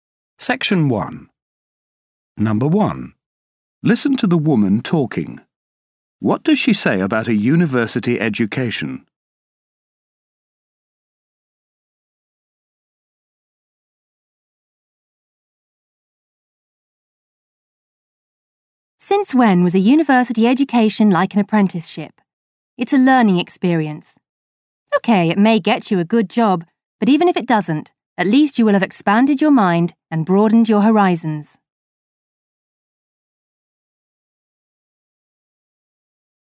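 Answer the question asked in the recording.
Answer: It is a learning experience that expands your mind, even if it doesn't get you a good job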